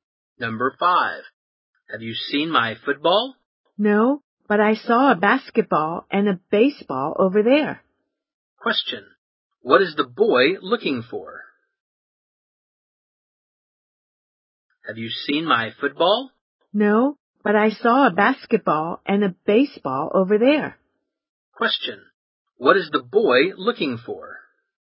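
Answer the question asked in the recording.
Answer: His football.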